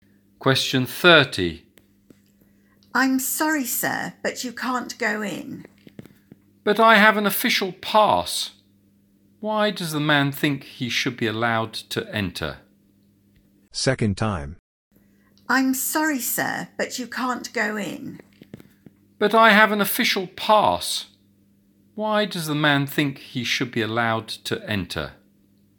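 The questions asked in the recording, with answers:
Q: Why does the man think he should be allowed to enter?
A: He has an official pass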